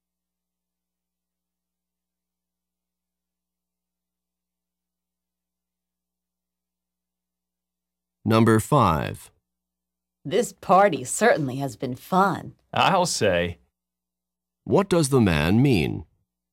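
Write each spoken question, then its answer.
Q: What does the man mean?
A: He agrees the party has been fun.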